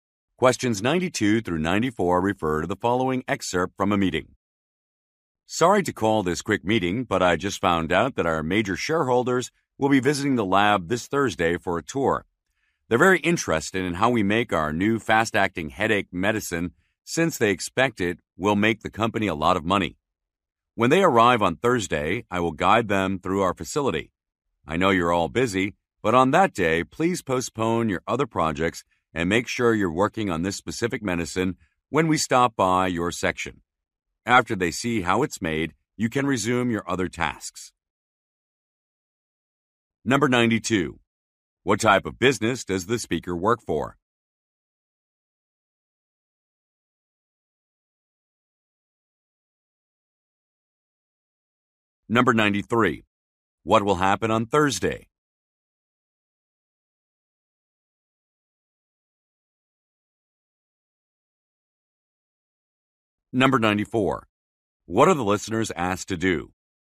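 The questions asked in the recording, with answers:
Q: What type of business does the speaker work for?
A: A pharmaceutical company

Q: What will happen on Thursday?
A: Major shareholders will tour the lab

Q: What are the listeners asked to do?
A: Postpone other projects and work on the headache medicine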